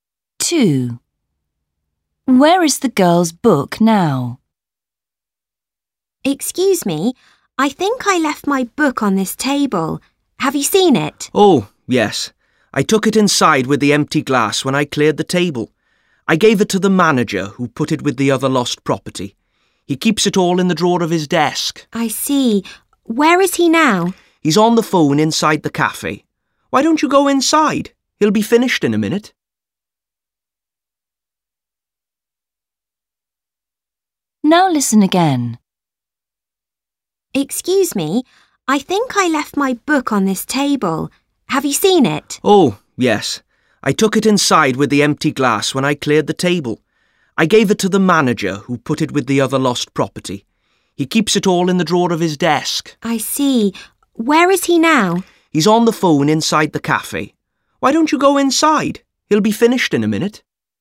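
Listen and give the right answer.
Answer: In the drawer of the manager's desk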